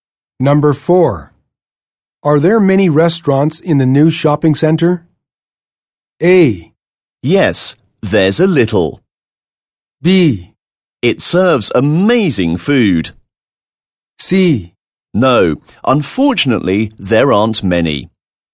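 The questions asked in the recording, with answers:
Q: Are there many restaurants in the new shopping center?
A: C: No, unfortunately, there aren't many.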